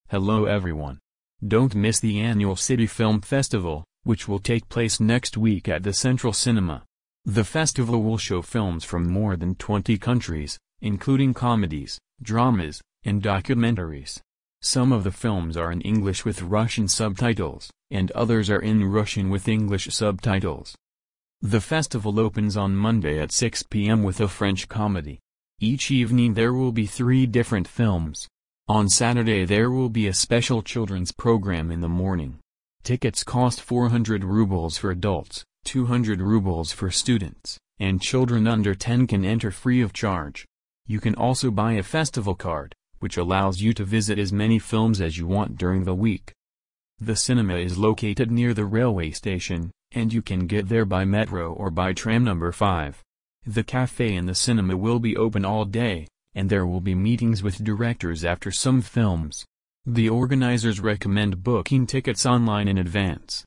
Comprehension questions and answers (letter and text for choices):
Прослушайте текст и выберите правильный вариант ответа (A, B, C или D).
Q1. What kind of event is being advertised?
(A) A theatre festival.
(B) A film festival.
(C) A music festival.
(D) An art exhibition.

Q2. How many countries take part in the festival?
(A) More than 10.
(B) More than 15.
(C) More than 20.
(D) More than 30.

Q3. When does the festival start?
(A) On Monday morning.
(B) On Monday evening.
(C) On Saturday morning.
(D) On Sunday evening.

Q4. What special programme is there on Saturday?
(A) A sports programme.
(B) A children's programme.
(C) A theatre play.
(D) A music show.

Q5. What does the festival card allow?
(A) To watch one film.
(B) To meet directors.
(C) To visit unlimited films.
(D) To get free snacks.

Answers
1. (B) A film festival.
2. (C) More than 20.
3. (B) On Monday evening.
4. (B) A children's programme.
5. (C) To visit unlimited films.

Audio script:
Hello everyone! Don't miss the annual City Film Festival, which will take place next week at the Central Cinema. The festival will show films from more than twenty countries, including comedies, dramas, and documentaries. Some of the films are in English with Russian subtitles, and others are in Russian with English subtitles.
The festival opens on Monday at 6 pm with a French comedy. Each evening there will be three different films. On Saturday there will be a special children's programme in the morning. Tickets cost 400 rubles for adults, 200 rubles for students, and children under 10 can enter free of charge. You can also buy a festival card, which allows you to visit as many films as you want during the week.
The cinema is located near the railway station, and you can get there by metro or by tram number 5. The café in the cinema will be open all day, and there will be meetings with directors after some films. The organisers recommend booking tickets online in advance.

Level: 8 класс